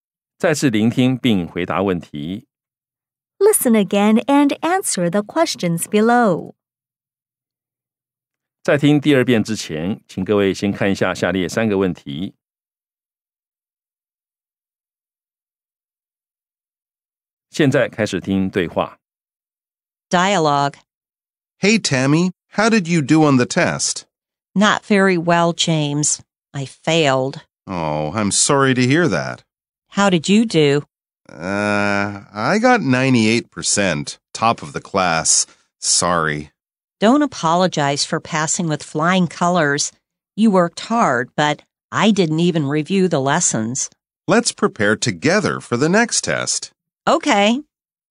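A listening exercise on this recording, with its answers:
再次聆聽並回答問題 Listen again and answer the questions below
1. Did the woman pass the test?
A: No, she failed.

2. How did the man do on the test?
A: He got 98%, top of the class.

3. What does the man suggest to the woman?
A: That they prepare together for the next test.

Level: 中階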